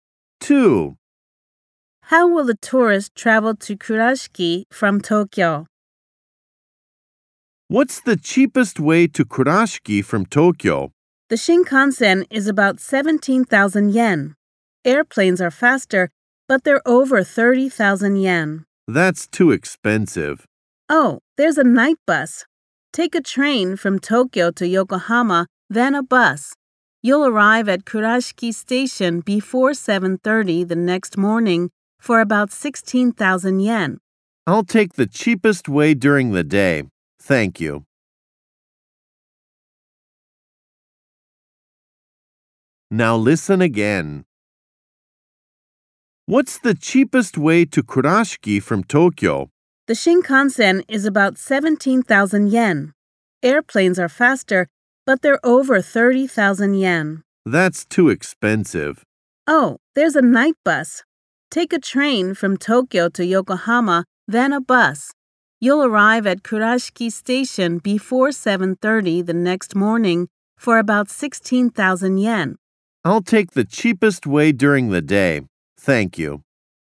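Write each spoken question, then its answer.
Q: How will a tourist travel to Kurashiki from Tokyo?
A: By Shinkansen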